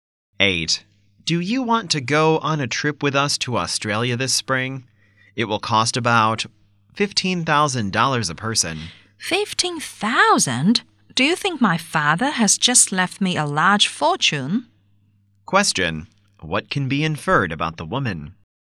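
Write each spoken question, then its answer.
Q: What can be inferred about the woman?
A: She can't afford the trip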